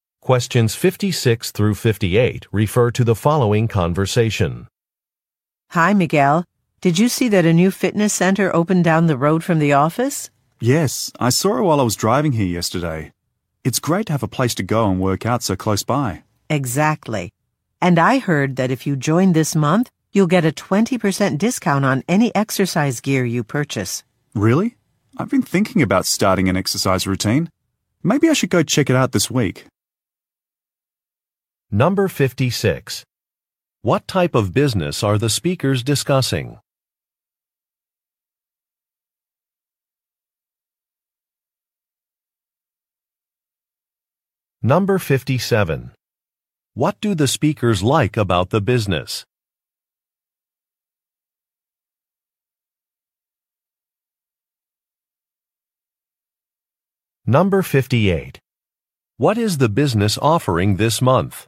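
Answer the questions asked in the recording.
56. A fitness center
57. It is close to the office
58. A 20% discount on exercise gear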